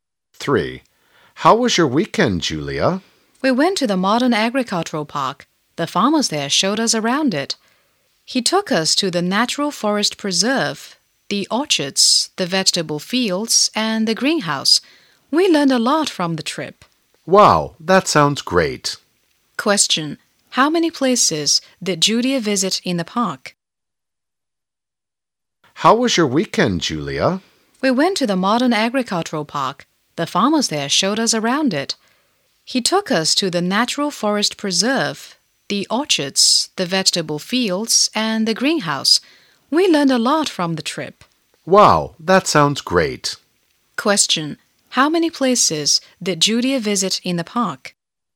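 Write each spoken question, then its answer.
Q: Question, how many places did Julia visit in the park?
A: Four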